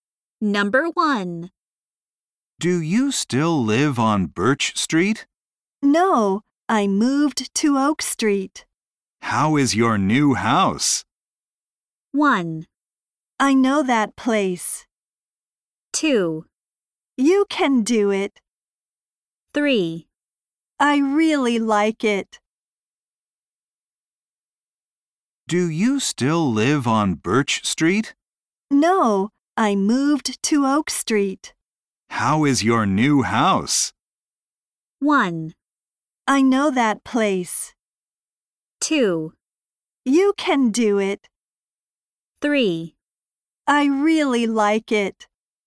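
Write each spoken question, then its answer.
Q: How is your new house?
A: 3: I really like it.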